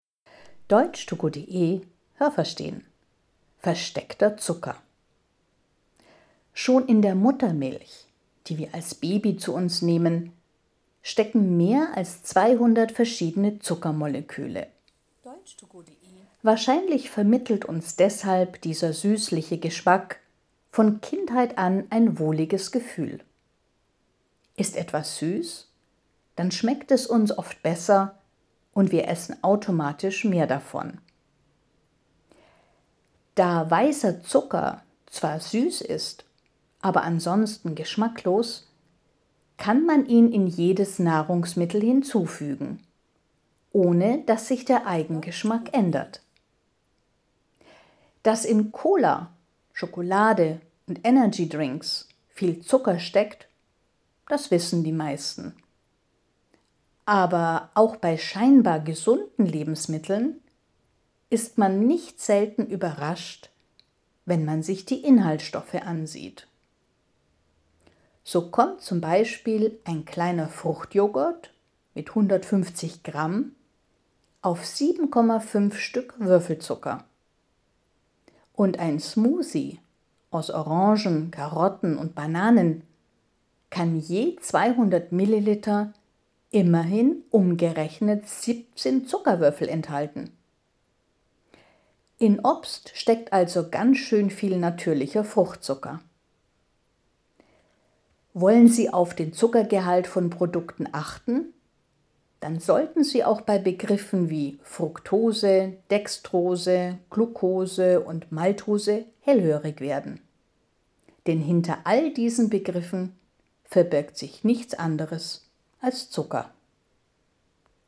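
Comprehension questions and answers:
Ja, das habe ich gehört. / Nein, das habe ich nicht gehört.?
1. Schon Babys trinken Milch mit über 200 verschiedenen Zucker-Molekülen.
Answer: Ja, das habe ich gehört.

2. Die süßliche Muttermilch prägt uns von Kindheit an und beeinflusst wahrscheinlich unsere Geschmacksvorlieben.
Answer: Ja, das habe ich gehört.

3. Weißer Zucker ist nur süß, ansonsten hat er keinen Geschmack.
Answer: Ja, das habe ich gehört.

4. Gibt man weißen Zucker in andere Nahrungsmittel, dann ändert sich der Eigengeschmack der Nahrungsmittel.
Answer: Nein, das habe ich nicht gehört.

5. Alle gesunden Lebensmittel enthalten fast keinen Zucker.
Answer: Nein, das habe ich nicht gehört.

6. In einem Mixgetränk (200 ml) aus Orangen, Karotten und Bananen stecken 10 Stück Würfelzucker.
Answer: Nein, das habe ich nicht gehört.

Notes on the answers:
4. Der Eigengeschmack der Nahrungsmittel ändert sich nicht, wenn man weißen Zucker hinzufügt.
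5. Auch in scheinbar gesunden Lebensmitteln steckt oft sehr viel Zucker.

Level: B2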